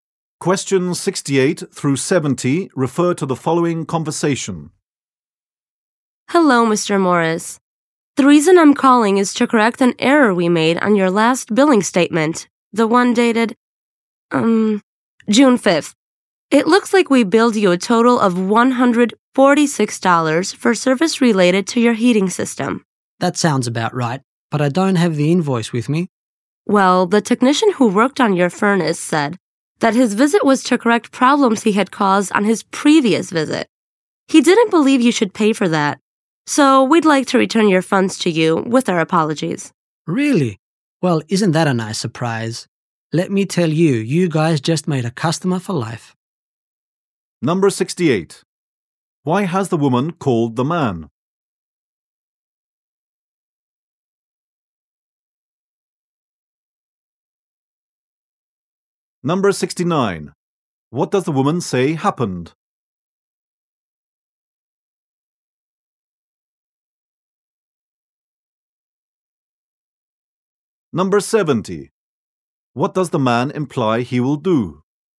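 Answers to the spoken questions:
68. To correct an error on his billing statement.
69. The technician was fixing problems he had caused earlier, so the charge will be refunded.
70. Stay a customer for life.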